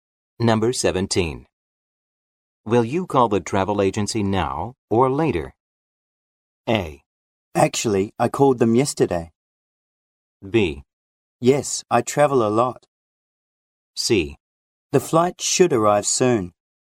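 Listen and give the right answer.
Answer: A: Actually, I called them yesterday.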